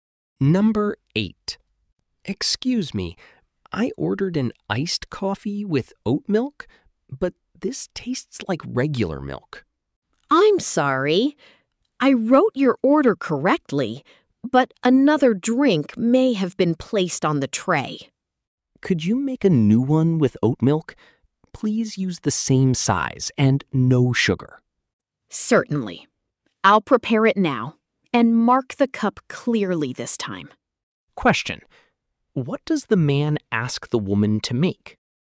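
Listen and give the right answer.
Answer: A new iced coffee with oat milk, same size, no sugar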